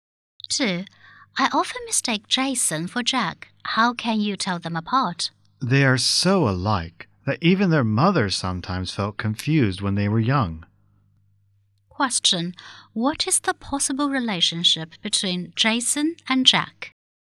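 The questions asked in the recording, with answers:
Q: What is the possible relationship between Jason and Jack?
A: Twin brothers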